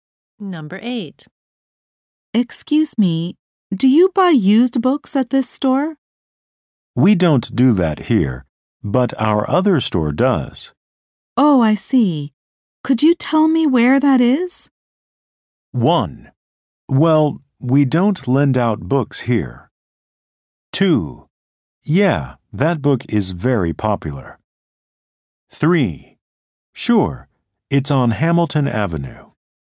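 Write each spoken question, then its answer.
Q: Oh, I see. Could you tell me where that is?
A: 3: Sure, it's on Hamilton Avenue.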